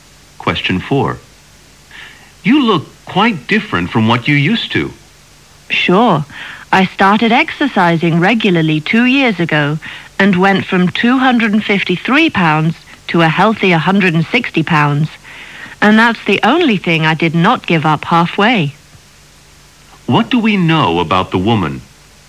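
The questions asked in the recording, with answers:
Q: What do we know about the woman?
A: She lost a lot of weight by exercising regularly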